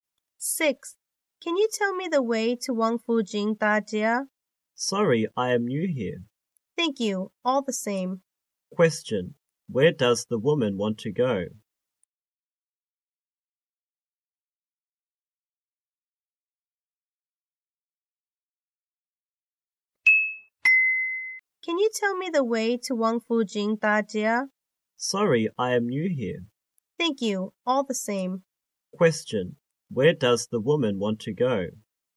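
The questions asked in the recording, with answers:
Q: Question, where does the woman want to go?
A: Wang Fu Jing Da Jia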